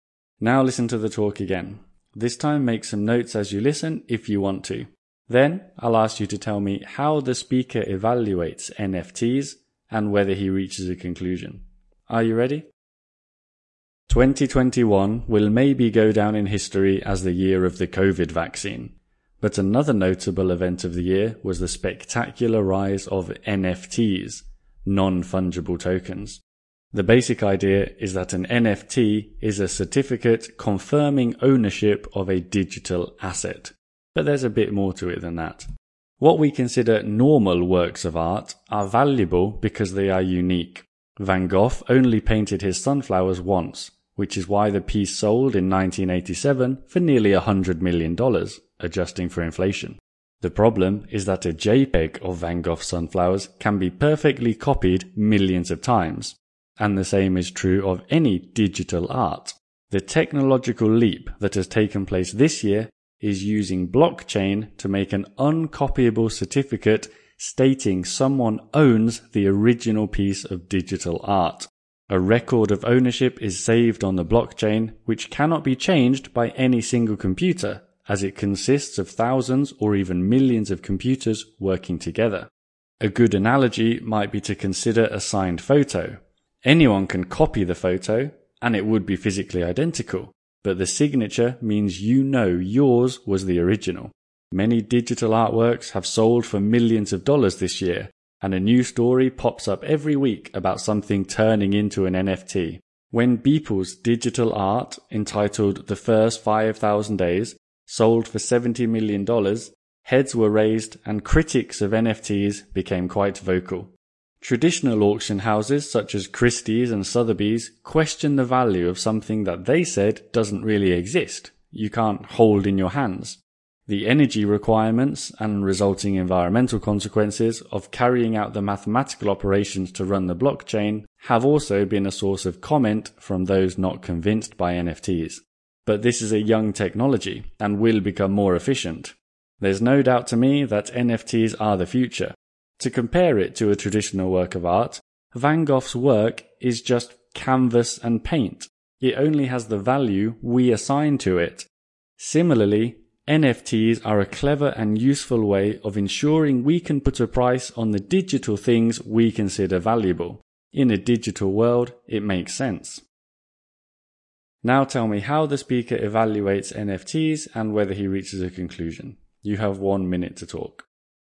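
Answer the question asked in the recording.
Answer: He weighs the critics' points (it doesn't really exist, energy and environmental cost) against the benefits. He concludes positively: NFTs are the future, a clever way to value digital things.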